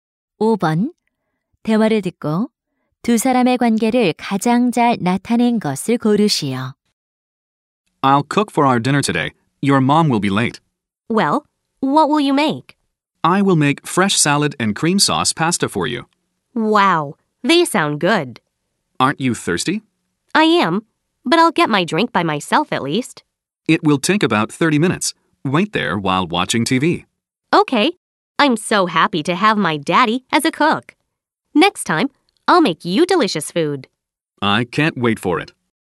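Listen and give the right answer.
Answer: 아빠와 딸(자녀)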